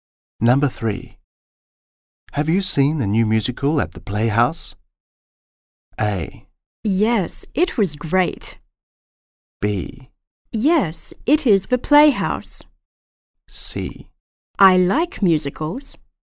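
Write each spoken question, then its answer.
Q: Have you seen the new musical at the Playhouse?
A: A: Yes, it was great.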